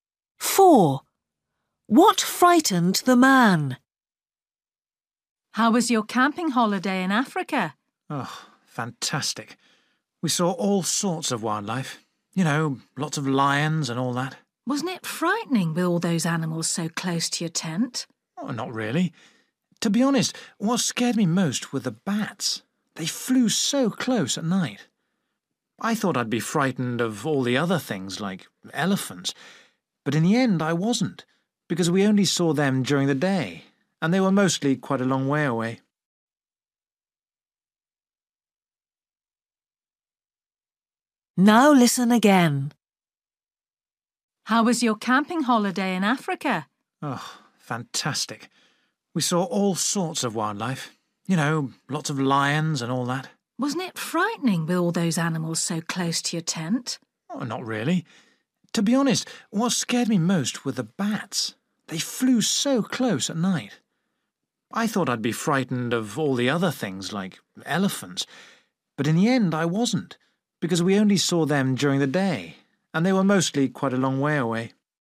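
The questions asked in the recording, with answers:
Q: What frightened the man?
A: bats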